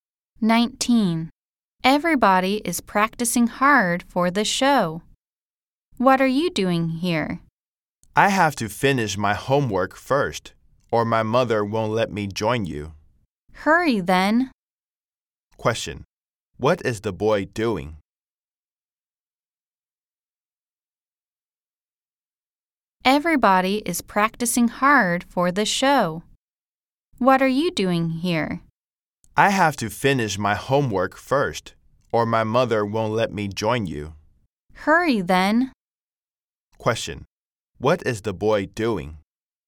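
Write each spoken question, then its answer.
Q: What is the boy doing?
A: Finishing his homework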